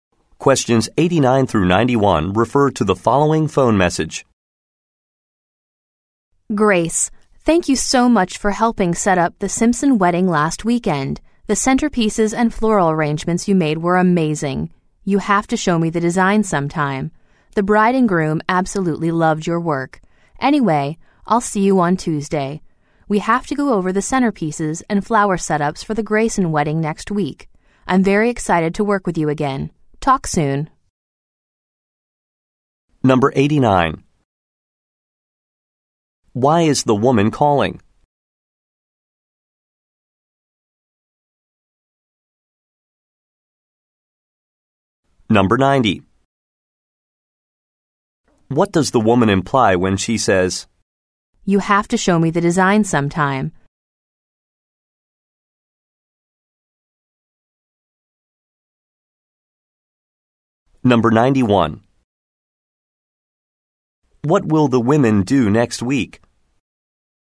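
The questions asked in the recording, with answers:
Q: Why is the woman calling?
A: To thank Grace for helping set up the Simpson wedding

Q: What will the women do next week?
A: Work on the Grayson wedding centerpieces and flower setups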